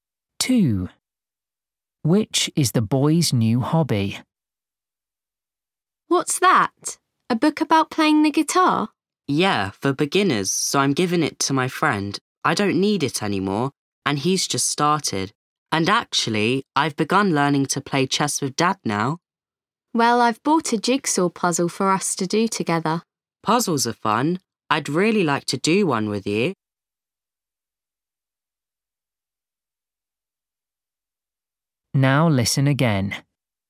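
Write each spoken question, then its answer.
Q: Which is the boy's new hobby?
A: playing chess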